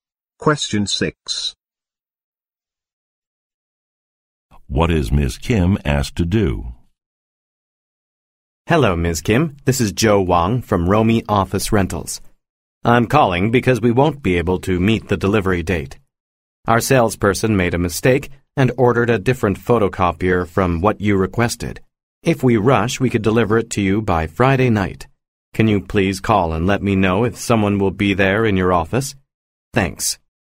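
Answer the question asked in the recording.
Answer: Call to say if someone will be in the office on Friday night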